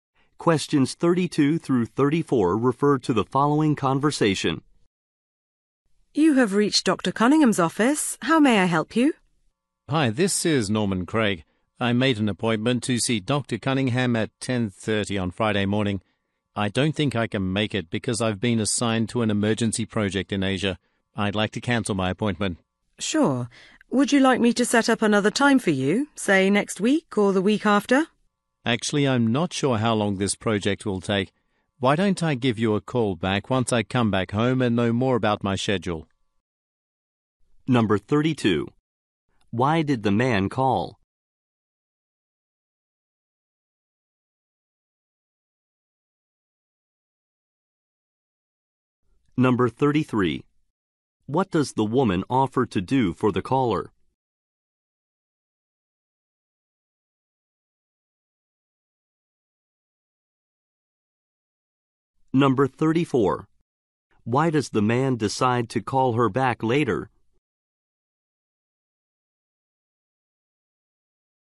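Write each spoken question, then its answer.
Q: Why did the man call?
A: To cancel his appointment

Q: What does the woman offer to do for the caller?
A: Set up another appointment time

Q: Why does the man decide to call her back later?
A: He doesn't know how long his project will take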